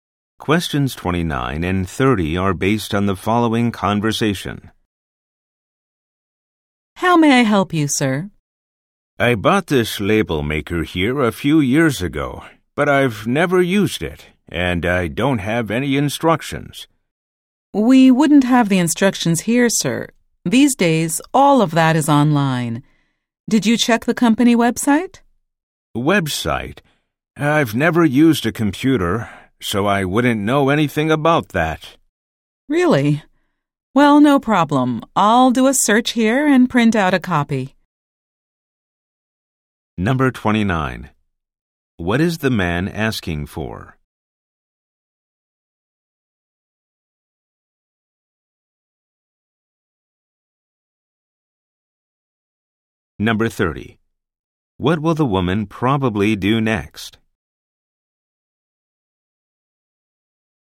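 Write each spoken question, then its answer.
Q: What is the man asking for?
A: Instructions for his label maker

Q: What will the woman probably do next?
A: Search online and print out a copy of the instructions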